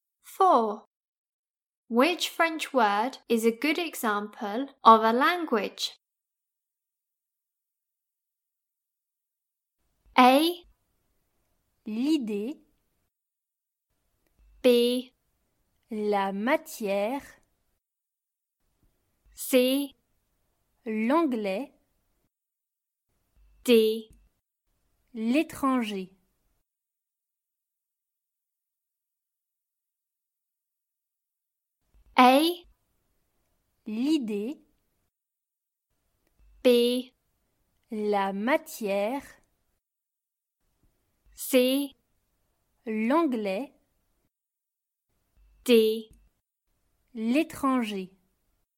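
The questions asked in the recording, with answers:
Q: Which French word is a good example of a language?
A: C: L'anglais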